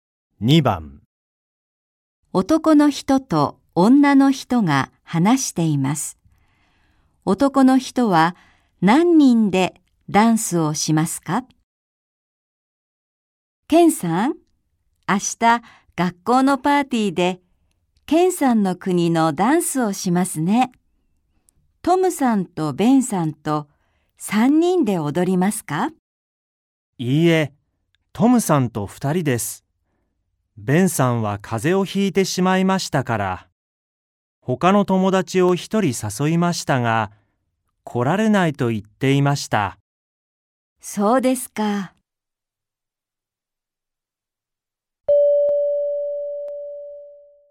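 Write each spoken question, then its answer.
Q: 男の人は何人でダンスをしますか?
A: 2人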